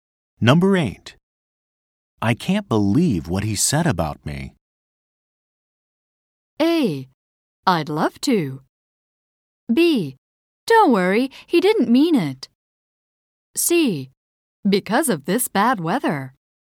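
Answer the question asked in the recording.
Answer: B: Don't worry, he didn't mean it.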